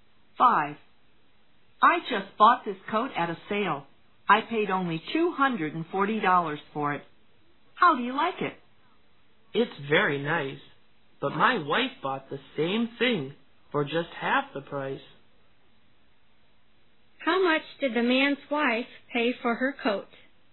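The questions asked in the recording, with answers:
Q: How much did the man's wife pay for her coat?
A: $120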